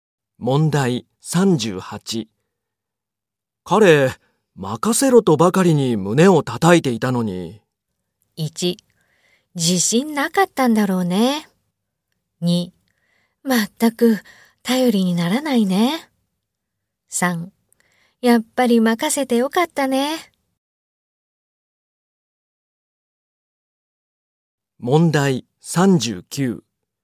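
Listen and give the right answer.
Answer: 2: 全く頼りにならないね。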